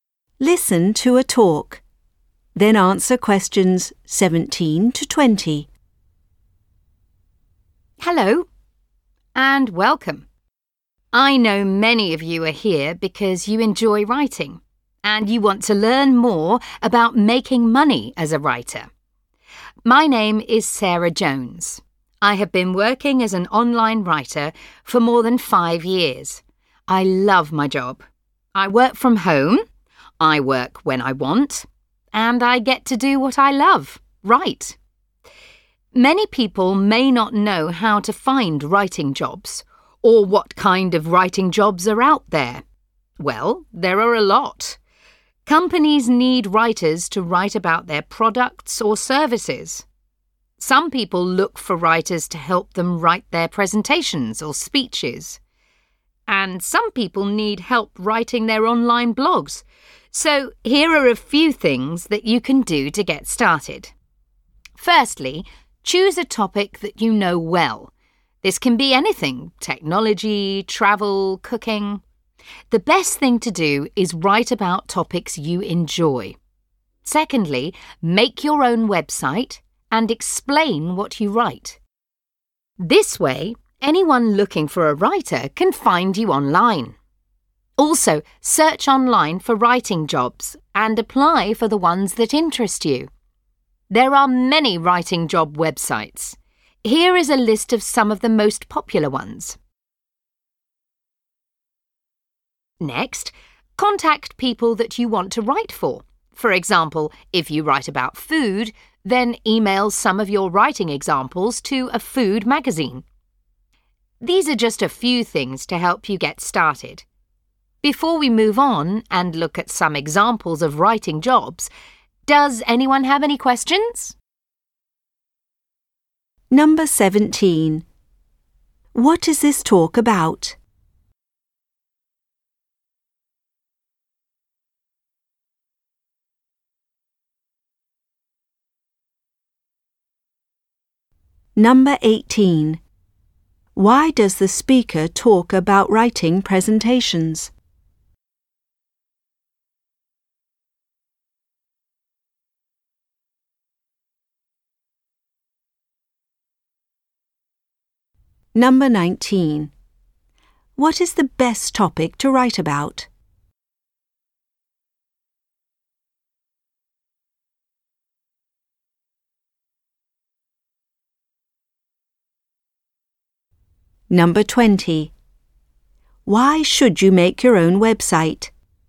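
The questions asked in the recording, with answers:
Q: What is this talk about?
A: How to get started making money as a writer

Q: Why does the speaker talk about writing presentations?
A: As an example of the kinds of writing jobs out there

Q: What is the best topic to write about?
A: Topics you enjoy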